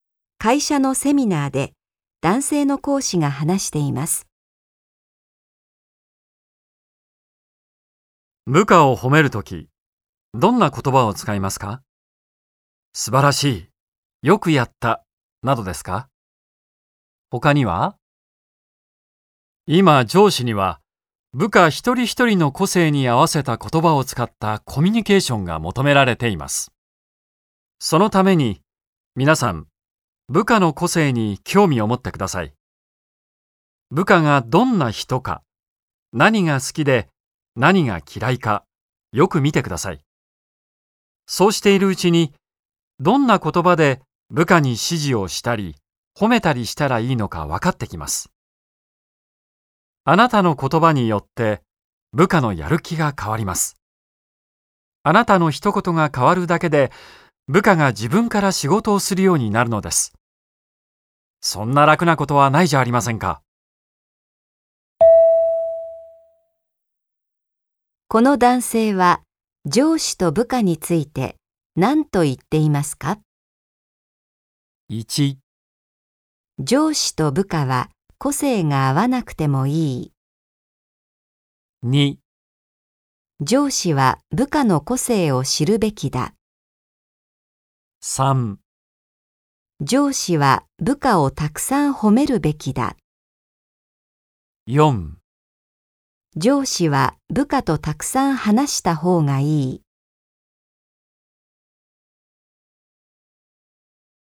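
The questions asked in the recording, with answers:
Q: この男性は上司と部下について何と言っていますか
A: 2: 上司は部下の個性を知るべきだ。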